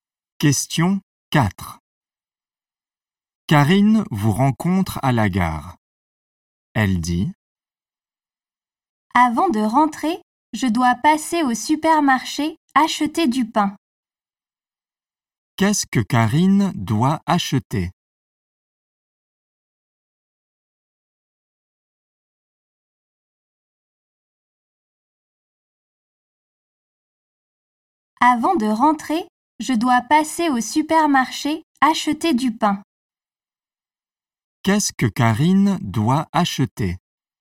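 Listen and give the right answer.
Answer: Du pain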